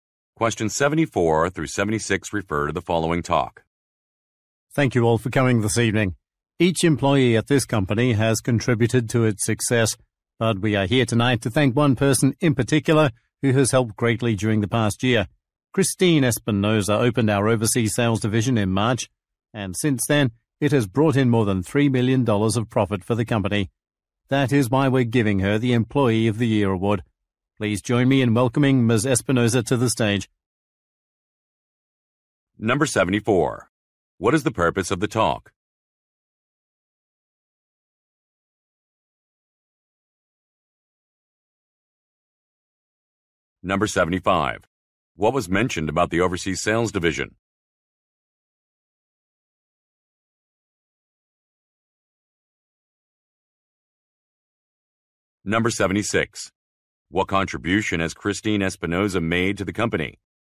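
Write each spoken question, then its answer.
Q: What is the purpose of the talk?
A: To present an Employee of the Year award.

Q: What was mentioned about the overseas sales division?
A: It opened in March and has made over $3 million in profit.

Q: What contribution has Christine Espinosa made to the company?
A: She opened the overseas sales division.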